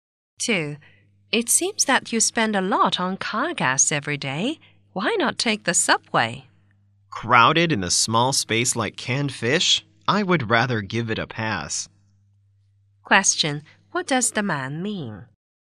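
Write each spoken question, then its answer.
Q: What does the man mean?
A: He doesn't want to take the crowded subway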